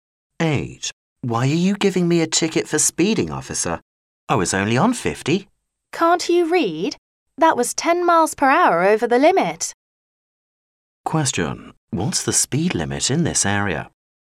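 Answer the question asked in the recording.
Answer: 40 miles per hour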